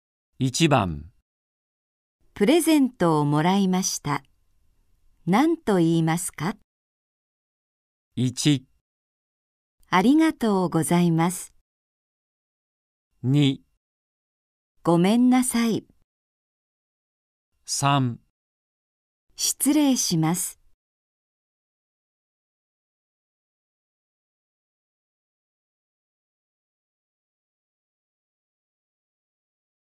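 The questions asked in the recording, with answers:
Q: プレゼントをもらいました。何と言いますか?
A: 1: ありがとうございます。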